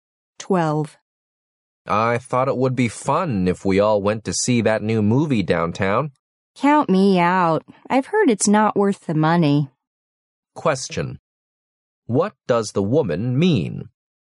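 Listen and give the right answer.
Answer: She doesn't want to go to the movie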